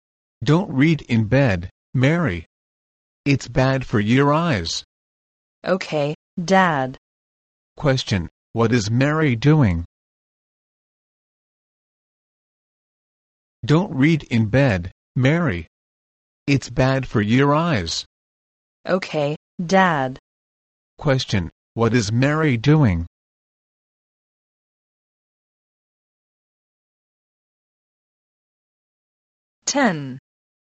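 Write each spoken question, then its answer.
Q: Question, what is Mary doing?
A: Reading in bed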